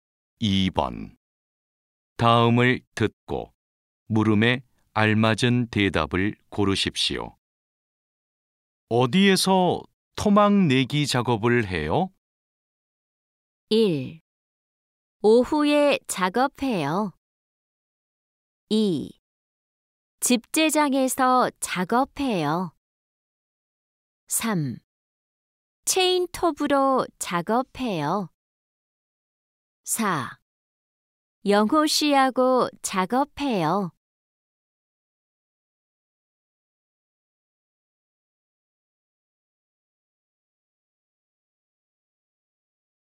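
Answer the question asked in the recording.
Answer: 2: 집재장에서 작업해요.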